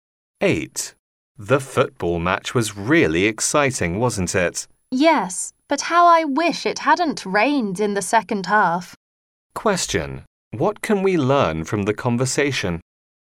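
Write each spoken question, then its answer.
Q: What can we learn from the conversation?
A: It rained in the second half of the match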